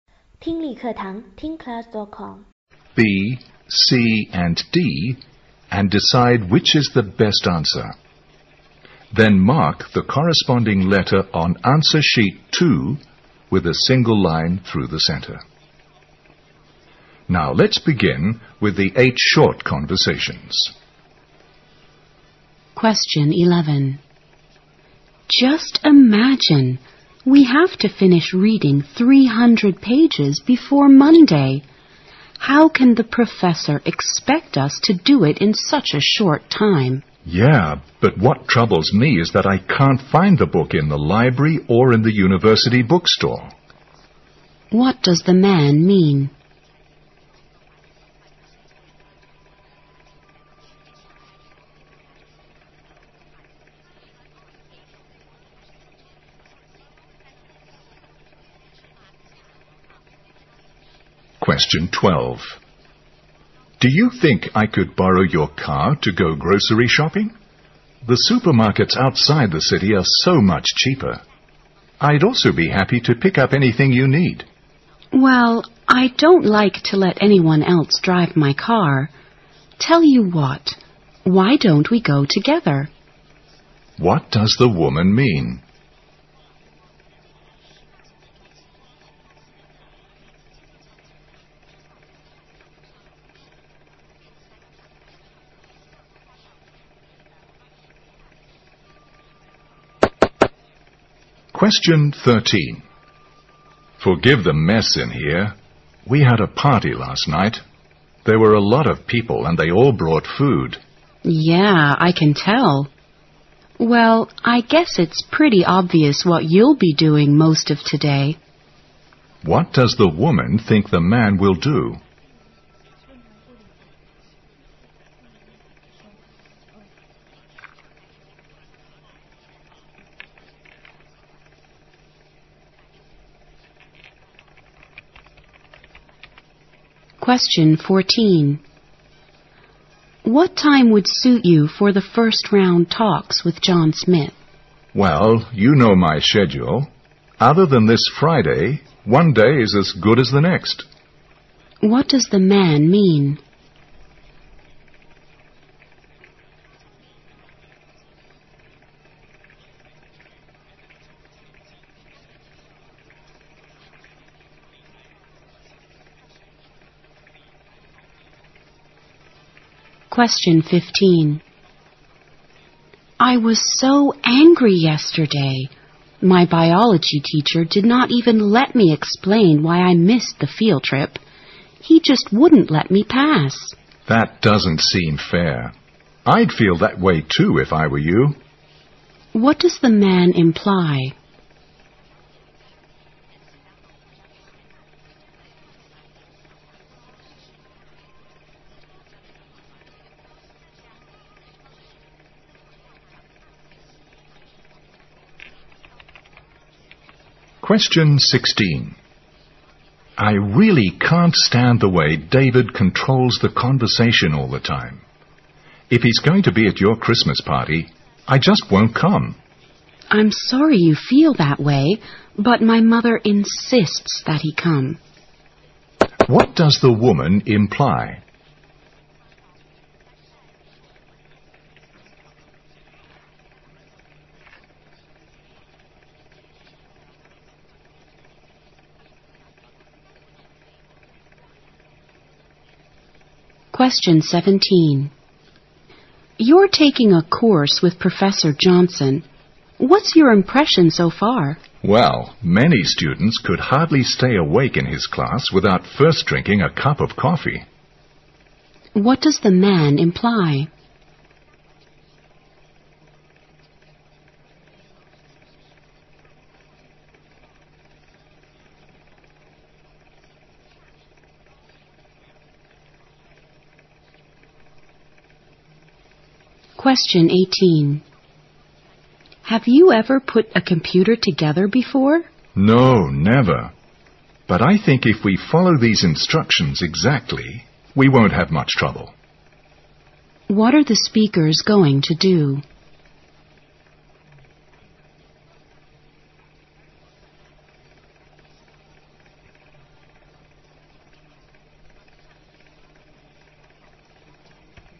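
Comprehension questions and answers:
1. What does the woman mean?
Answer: She will not lend her car, but they can go shopping together.

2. What does the woman think the man will do?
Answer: Clean up the room after the party.

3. What does the woman imply?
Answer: David will come to the party.

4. What are the speakers going to do?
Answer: Put a computer together.

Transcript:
W: Just imagine! We have to finish reading 300 pages before Monday! How can the professor expect us to do it in such a short time?
M: Yeah, but what troubles me is that I can't find the book in the library or in the university bookstore。
Q: What does the man mean?
M: Do you think I could borrow your car to go grocery shopping? The supermarkets outside the city are so much cheaper. I'd also be happy to pick up anything you need。
W: Well, I don't like to let anyone else drive my car. Tell you what, why don't we go together?
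Q: What does the woman mean?
M: Forgive the mess in here, we have a party last night. There were a lot of people and they all brought food。
W: Yeah, I can tell. Well, I guess it's pretty obvious what you'll be doing most of today。
Q: What does the woman think the man will do?
14. W: What time would suit you for the first round talks with John Smith?
M: Well, you know my schedule. Other than this Friday, one day is as good as the next。
W: I was so angry yesterday! My biology teacher did not even let me explain why I missed the field trip. He just wouldn't let me pass!
M: That doesn't seem fair. I'd feel that way too if I were you。
M: I really can't stand the way David controls the conversation all the time. If he is going to be at your Christmas party, I just won't come。
W: I'm sorry you feel that way, but my mother insists that he come。
W: You're taking a course with Professor Johnson. What's your impression so far?
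M: Well, many students could hardly stay awake in his class without first drinking a cup of coffee。
18. W: Have you ever put a computer together before?
M: No, never. But I think if we follow these instructions exactly, we won't have much trouble。
Q: What are the speakers going to do?

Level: 四级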